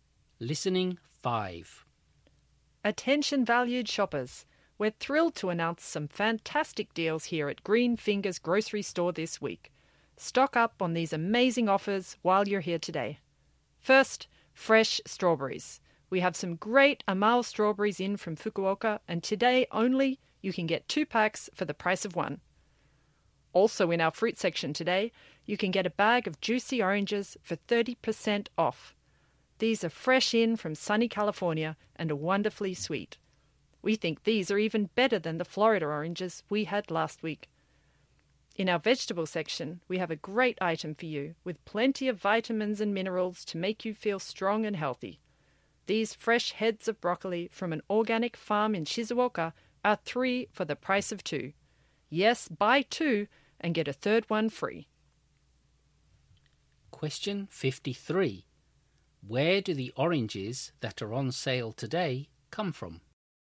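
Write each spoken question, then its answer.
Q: Where do the oranges that are on sale today come from?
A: California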